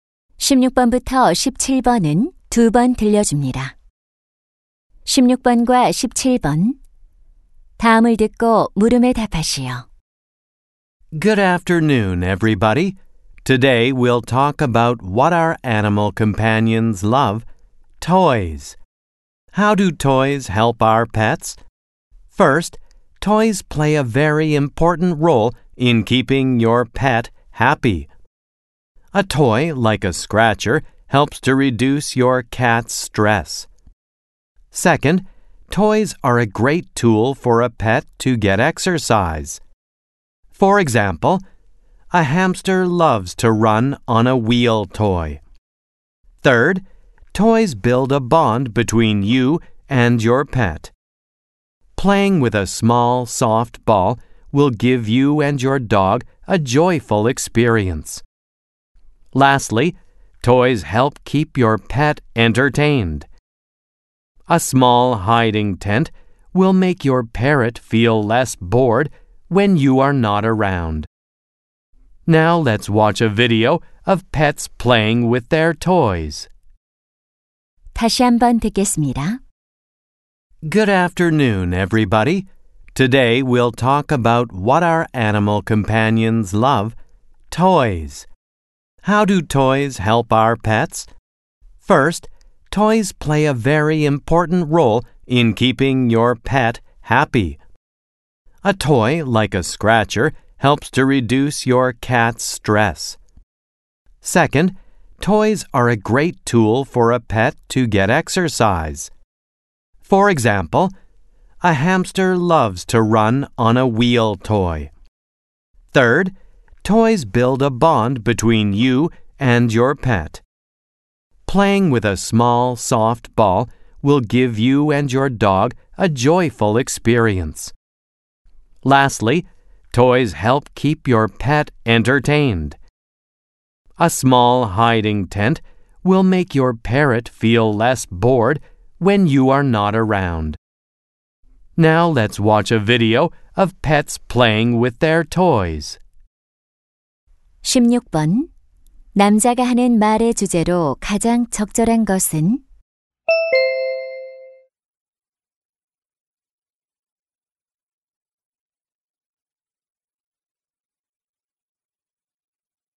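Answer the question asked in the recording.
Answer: 장난감이 반려동물에게 주는 도움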